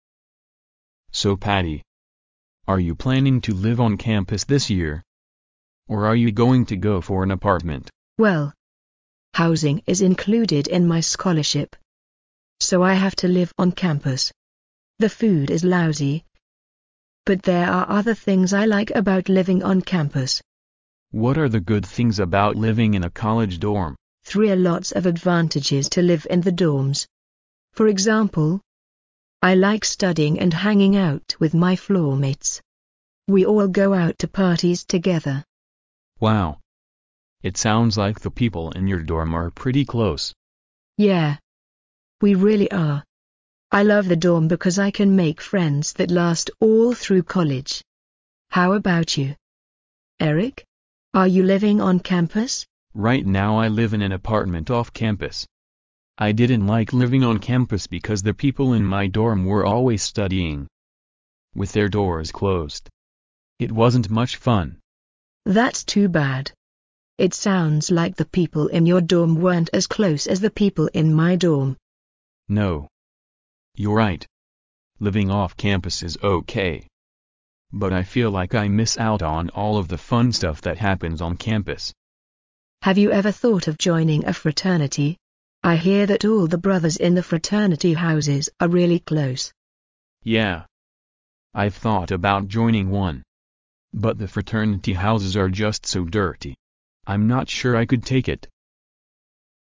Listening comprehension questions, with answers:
Listen to the conversation, and mark each statement as either true (T) or false (F) according to what you hear.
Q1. Patty has won a scholarship for her tuition and she only has to pay for her living on campus.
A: 错

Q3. Eric doesn't live on campus because he doesn't like the atmosphere in his previous dorm on campus.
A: 对

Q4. Although living off campus, Eric sill misses his floormates on campus.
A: 错

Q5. Eric doesn't want to join a fraternity because he thinks the fraternity houses are very dirty.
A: 对

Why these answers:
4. 题目意为:尽管埃里克不在学校住,但是他还是很想念学校的室友。对话中,男士提到"Living off campus is OK, but I feel like I miss out on all of the fun stuff that happens on campus",即男士认为在校园外生活是可以的,但觉得自己错过了校园里发生的所有有趣的事情。因此该说法错误。

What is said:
[听力原文] M: So Patty, are you planning to live on campus this year, or are you going to go for an apartment? W: Well, housing is included in my scholarship, so I have to live on campus. The food is lousy, but there are other things I like about living on campus. M: What are the good things about living in a college dorm? W: There're lots of advantages to live in the dorms. For example, I like studying and hanging out with my floormates. We all go out to parties together, M: Wow, it sounds like the people in your dorm are pretty close. W: Yeah, we really are. I love the dorm because I can make friends that last all through college. How about you, Eric? Are you living on campus? M: Right now I live in an apartment off campus. I didn't like living on campus because the people in my dorm were always studying, with their doors closed. It sounds like the people in your dorm weren't as close as the people in my dorm. M: No, you're right. Living off campus is OK, but I feel like I miss out on all of' the fun stuff that happens on campus. W: Have you ever thought of joining a fraternity? I hear that all the brothers in the fraternity houses are really close. M: Yeah, I've thought about joining one. But the fraternity houses are just so dirty! I'm not sure I could take it.